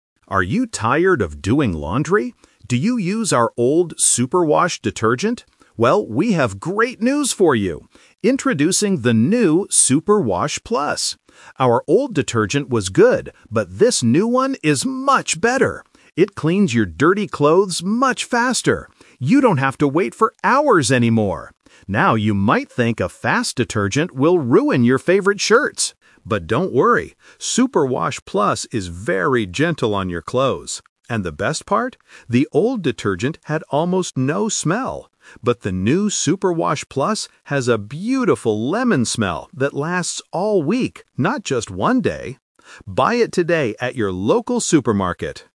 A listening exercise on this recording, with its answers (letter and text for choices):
Listen to the advertisement and choose the correct answer A, B, or C.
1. What is special about the new "Super Wash Plus"?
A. It cleans clothes much faster.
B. It takes hours to wash clothes.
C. It is cheaper than the old one.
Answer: A. It cleans clothes much faster.

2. What is a problem with some other fast detergents?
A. They have no smell.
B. They can ruin your shirts.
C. They are very expensive.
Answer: B. They can ruin your shirts.

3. What does the announcer say about the lemon smell?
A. It has a beautiful smell for one day.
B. It lasts all week.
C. It smells like sweet flowers.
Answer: B. It lasts all week.

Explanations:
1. The announcer clearly states that the new detergent "cleans your dirty clothes much faster." Option B is a trap because taking hours is what you used to do ("You don't have to wait for hours anymore"). Option C is a plausible guess for an ad, but the price is never mentioned.
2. This uses a contrast technique. The announcer says "you might think a fast detergent will ruin your favorite shirts. But don't worry! Super Wash Plus is very gentle." Option A is a trap because having no smell is the problem with the old detergent. Option C is not mentioned in the audio.
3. The announcer says the new detergent has "a beautiful lemon smell that lasts all week." Option A is the main trap because the audio specifically says "not just one day." Option C is a trap using a plausible scent (flowers), but the audio says it smells like lemons.

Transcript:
Announcer: Are you tired of doing laundry? Do you use our old "Super Wash" detergent? Well, we have great news for you! Introducing the new "Super Wash Plus". Our old detergent was good, but this new one is much better. It cleans your dirty clothes much faster. You don't have to wait for hours anymore! Now, you might think a fast detergent will ruin your favorite shirts. But don't worry! Super Wash Plus is very gentle on your clothes. And the best part? The old detergent had almost no smell. But the new Super Wash Plus has a beautiful lemon smell that lasts all week, not just one day. Buy it today at your local supermarket!